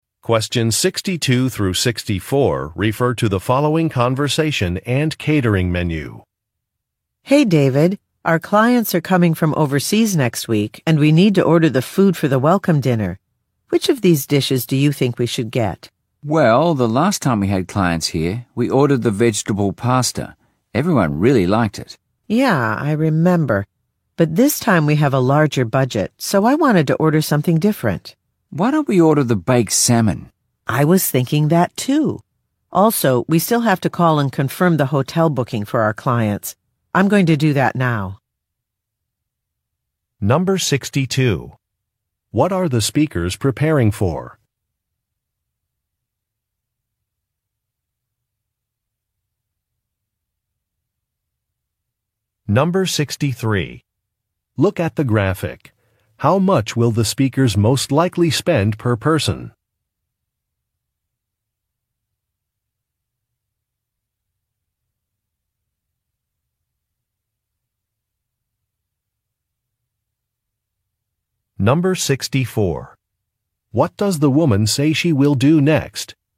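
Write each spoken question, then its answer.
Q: What are the speakers preparing for?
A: A welcome dinner for overseas clients

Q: What does the woman say she will do next?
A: Call to confirm the clients' hotel booking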